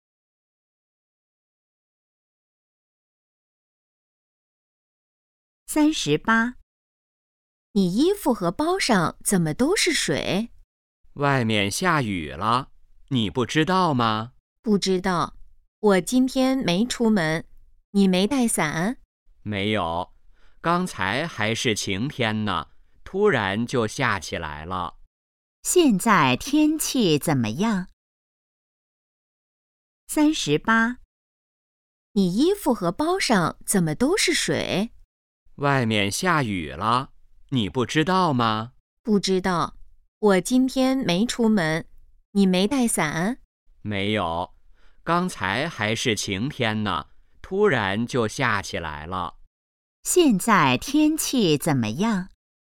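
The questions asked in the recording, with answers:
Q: 现在天气怎么样?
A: 下雨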